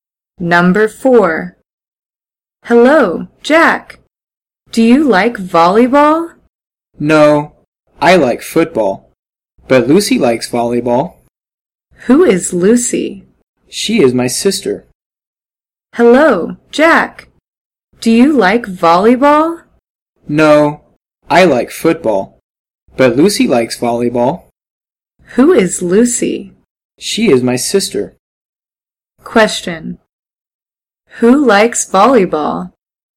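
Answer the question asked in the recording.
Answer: Lucy (Jack's sister)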